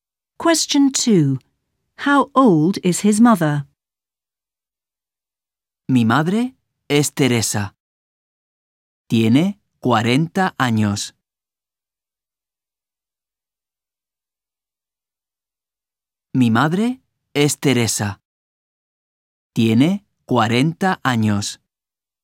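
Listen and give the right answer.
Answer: 40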